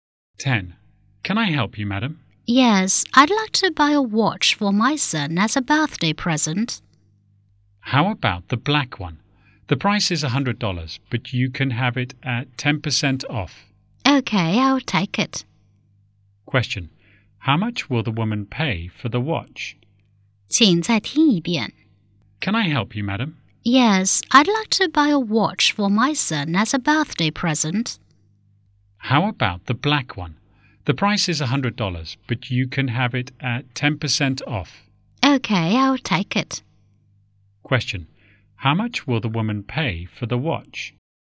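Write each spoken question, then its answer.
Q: Question. How much will the woman pay for the watch?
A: $90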